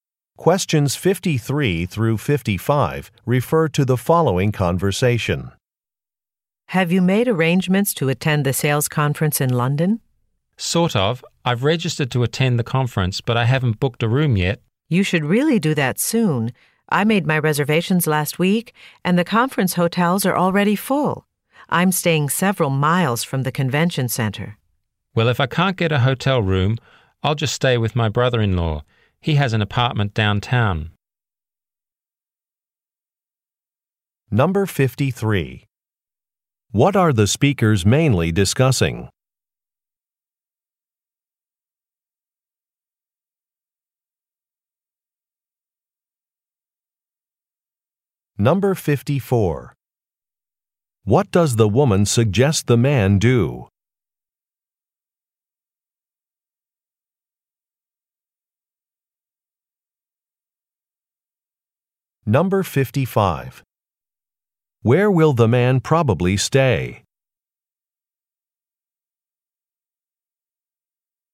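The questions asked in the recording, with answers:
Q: What are the speakers mainly discussing?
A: Arrangements for a sales conference in London

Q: What does the woman suggest the man do?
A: Book a hotel room soon

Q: Where will the man probably stay?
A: With his brother-in-law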